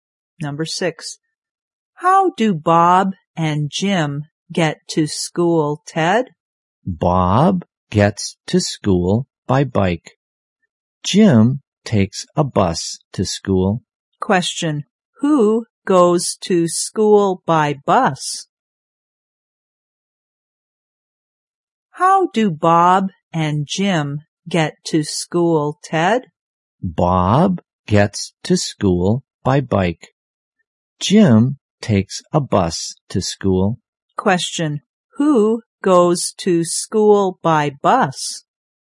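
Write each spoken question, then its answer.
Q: who goes to school by bus?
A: Jim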